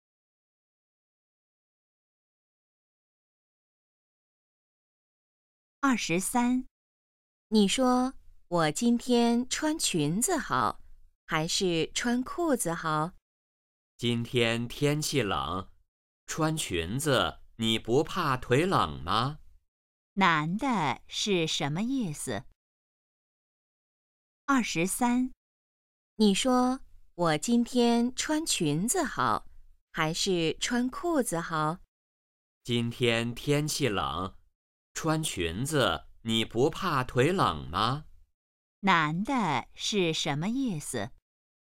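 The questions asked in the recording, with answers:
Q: 男的是什么意思?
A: 应该穿裤子,穿裙子会冷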